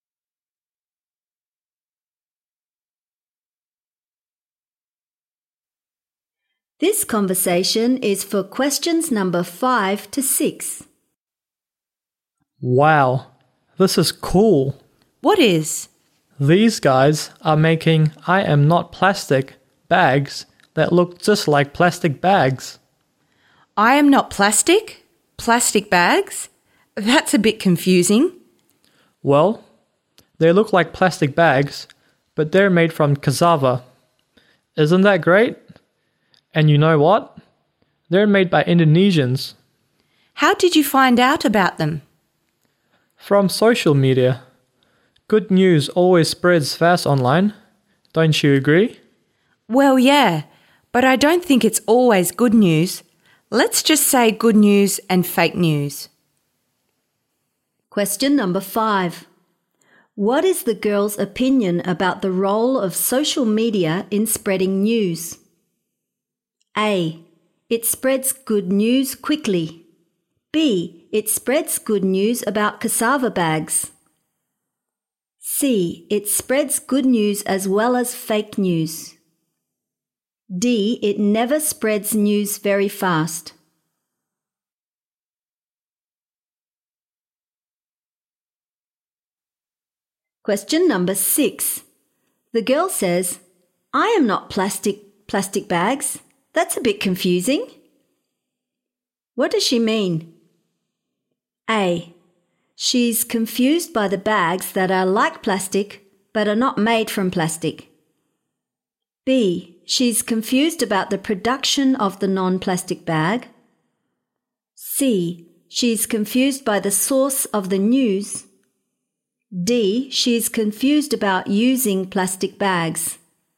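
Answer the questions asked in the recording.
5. C: It spreads good news as well as fake news.
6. A: She's confused by the bags that are like plastic but are not made from plastic.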